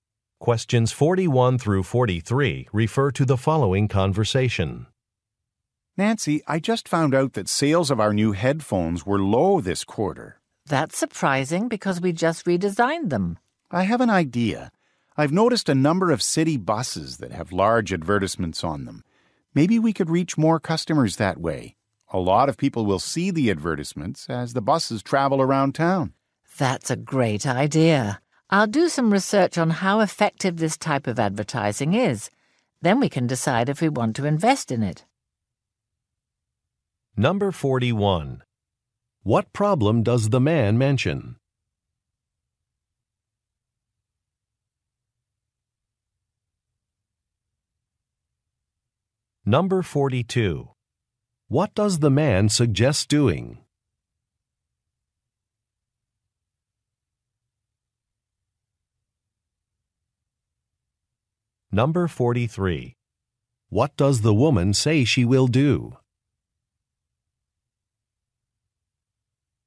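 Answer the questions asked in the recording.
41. Low sales of the new headphones
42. Advertising on city buses
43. Research how effective bus advertising is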